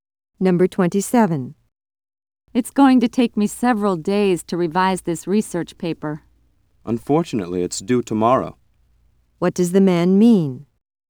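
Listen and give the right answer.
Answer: He doesn't have enough time to revise the paper before it's due.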